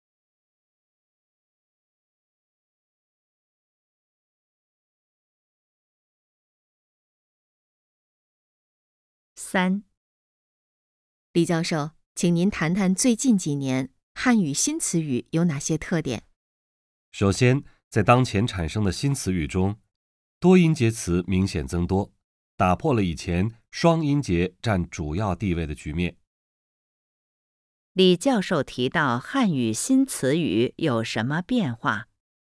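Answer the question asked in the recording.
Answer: 多音节词明显增多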